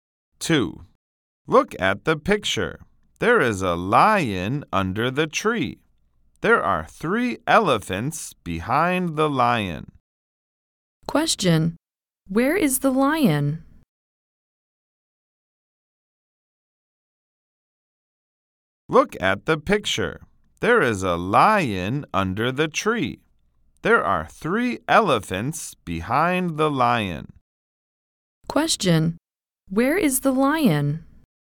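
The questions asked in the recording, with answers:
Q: Where is the lion?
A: Under the tree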